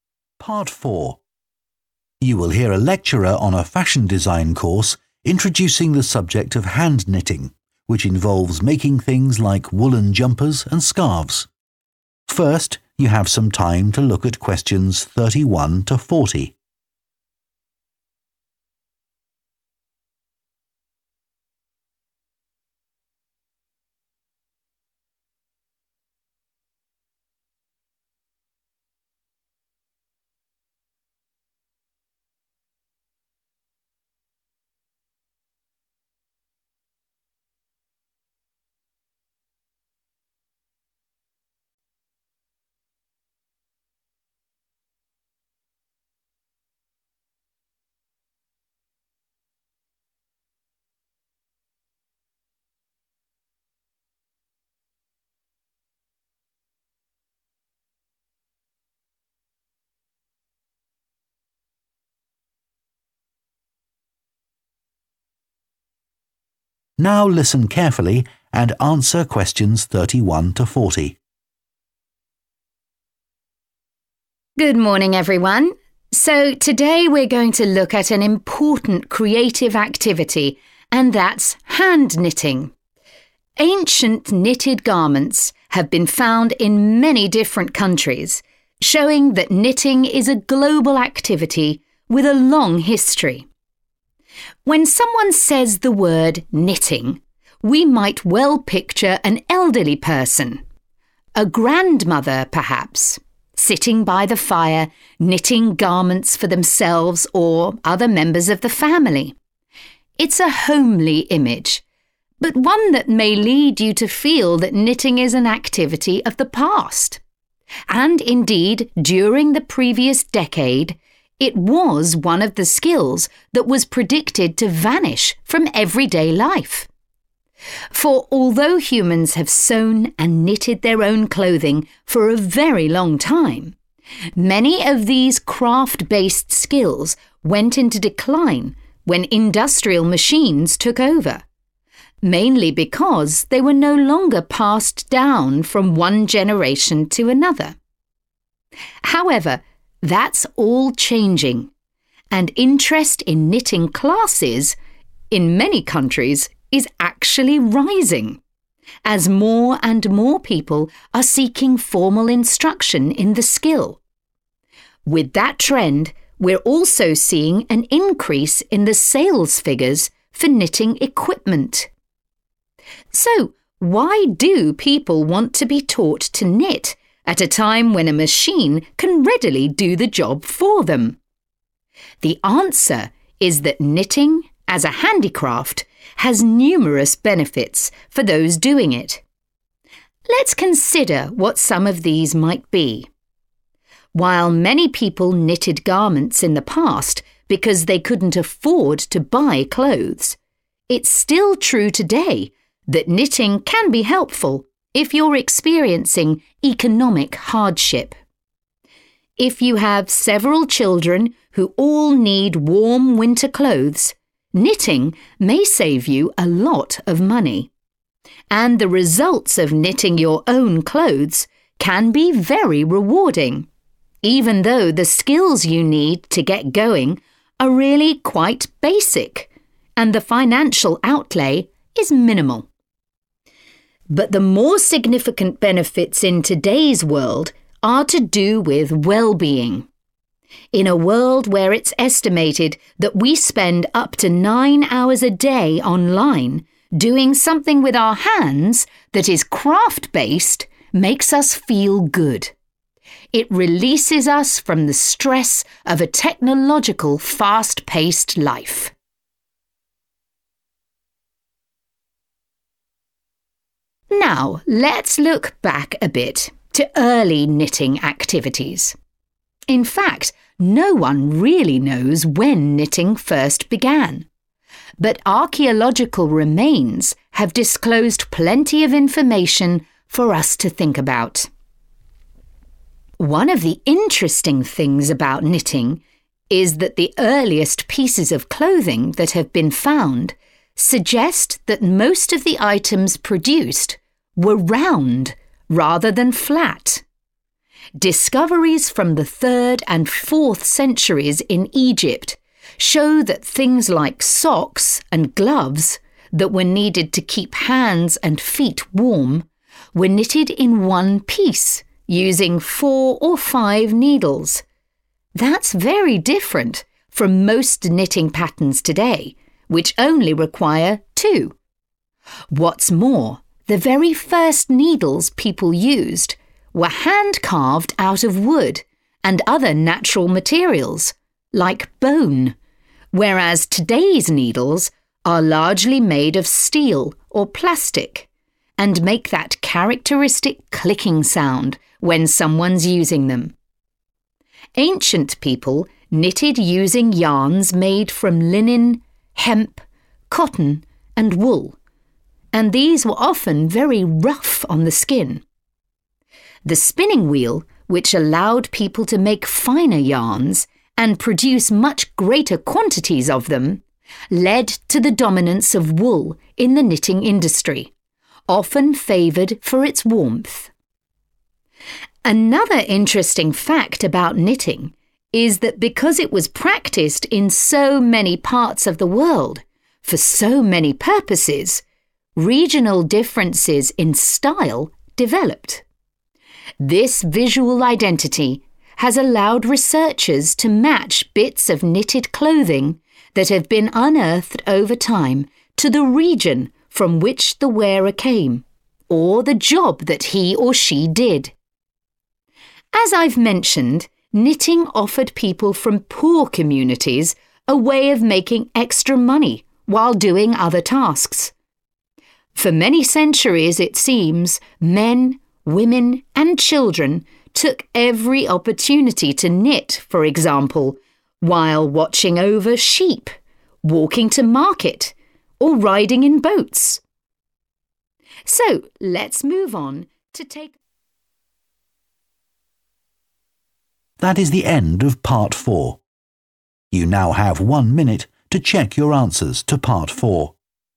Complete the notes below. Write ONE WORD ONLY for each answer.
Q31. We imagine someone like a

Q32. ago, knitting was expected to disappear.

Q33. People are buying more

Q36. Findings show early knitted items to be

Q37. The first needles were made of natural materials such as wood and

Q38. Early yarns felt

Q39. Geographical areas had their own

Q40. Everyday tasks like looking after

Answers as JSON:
{"31": "grandmother", "32": "decade", "33": "equipment", "36": "round", "37": "bone", "38": "rough", "39": "style", "40": "sheep"}